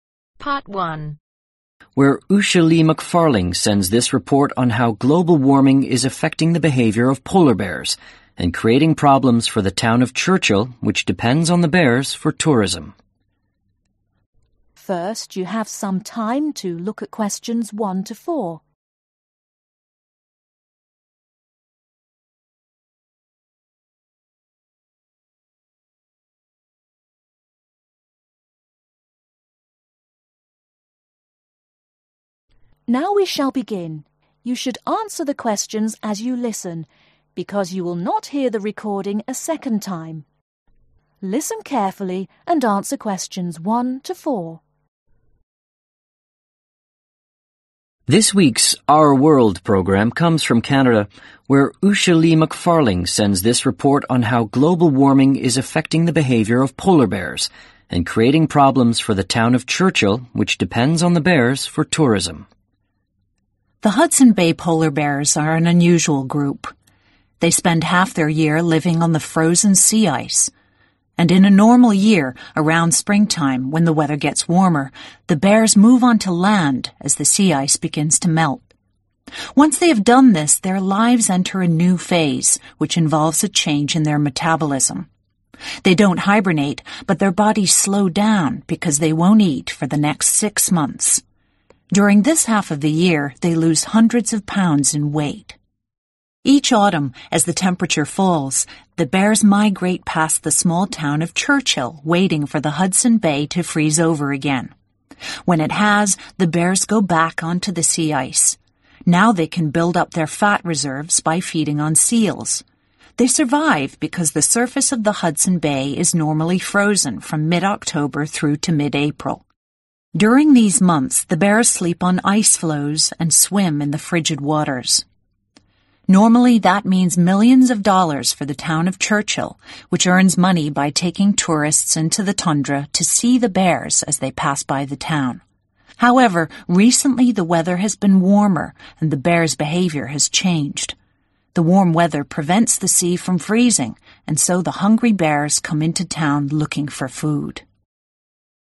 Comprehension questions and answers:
Complete the notes below. Write ONE WORD AND/OR A NUMBER for each answer.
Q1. Move onto ............ when ice melts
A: Land

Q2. No food for next (2)............ months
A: Six

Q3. Early Autumn (3)............ past Churchill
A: Migrate

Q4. Feed on (4)............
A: Seals